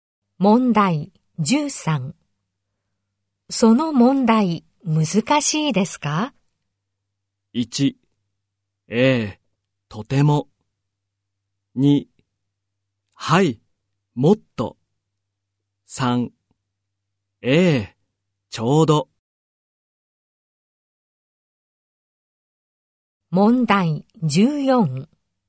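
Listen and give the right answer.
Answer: 1: ええ、とても。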